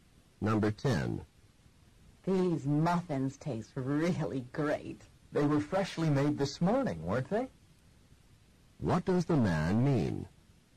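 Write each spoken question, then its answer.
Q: What does the man mean?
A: The muffins were freshly made this morning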